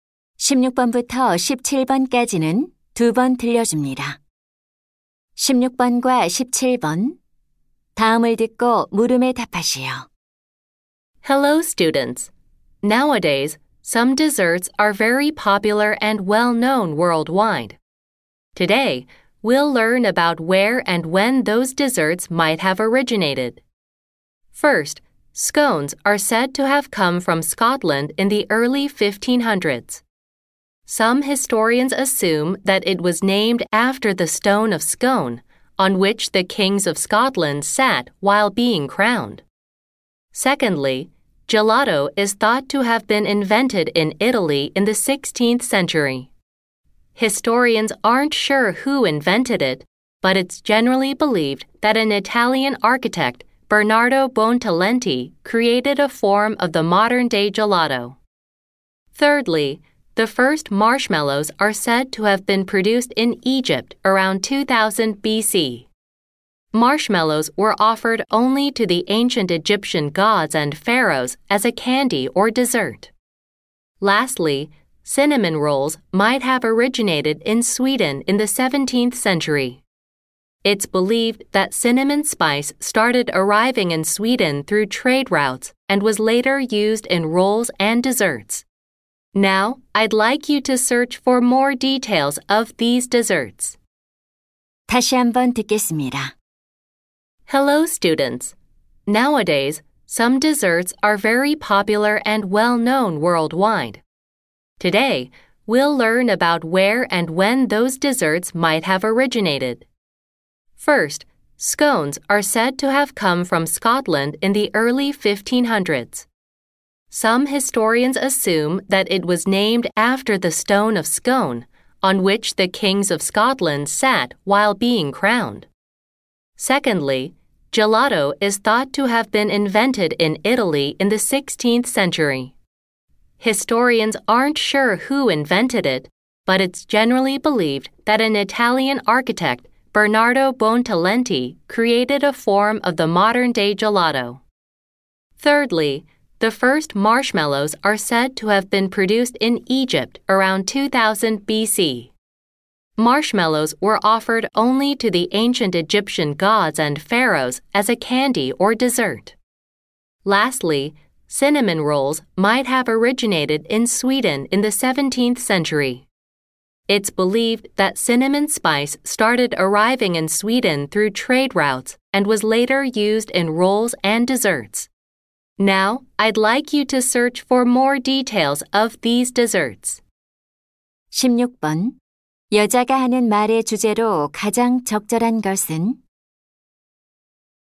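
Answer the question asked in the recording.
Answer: 유명한 디저트들의 기원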